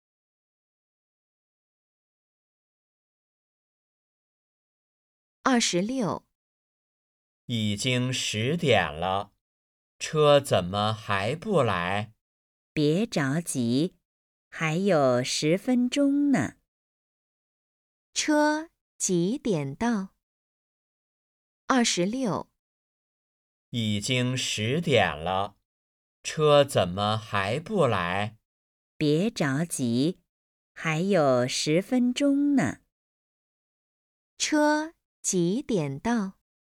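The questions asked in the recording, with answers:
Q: 车几点到?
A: 10点10分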